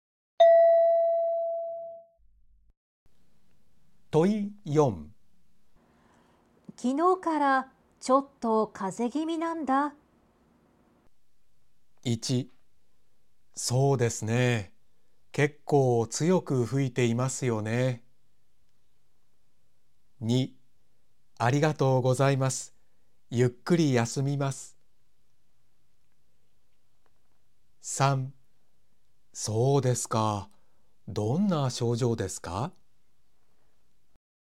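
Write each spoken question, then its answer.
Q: 昨日からちょっと風邪気味なんだ。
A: 3: そうですか、どんな症状ですか。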